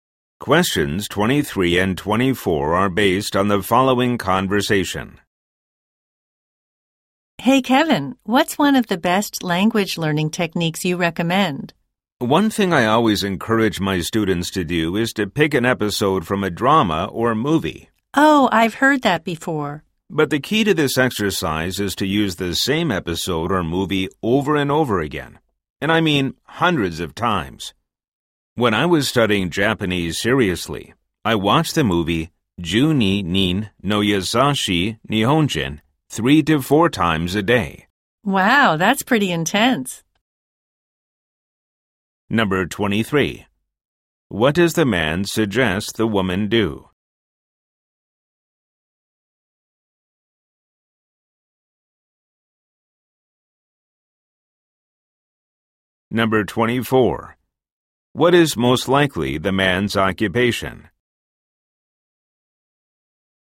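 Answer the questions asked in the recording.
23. Watch the same episode or movie over and over again
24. Language teacher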